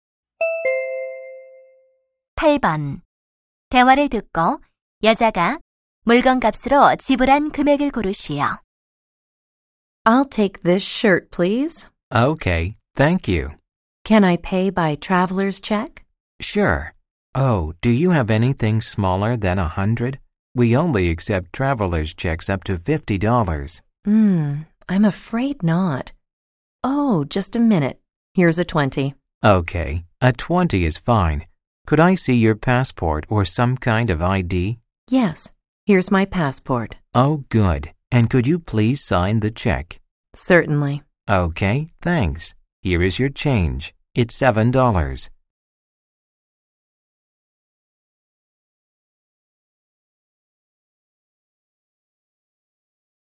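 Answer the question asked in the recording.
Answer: 13달러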